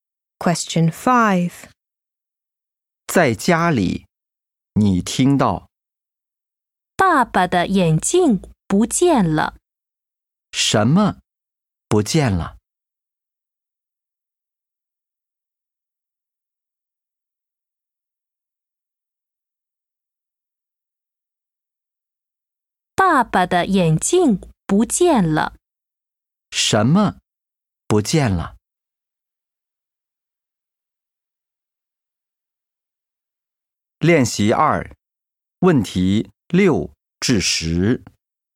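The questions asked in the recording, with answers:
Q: 什么不见了?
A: 爸爸的眼镜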